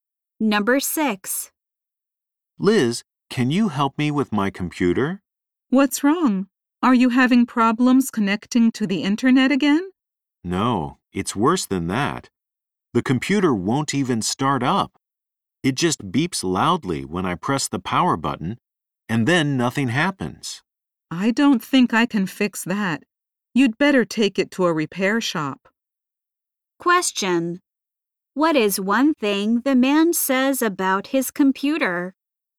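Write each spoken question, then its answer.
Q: What is one thing the man says about his computer?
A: It won't start up; it just beeps when he presses the power button.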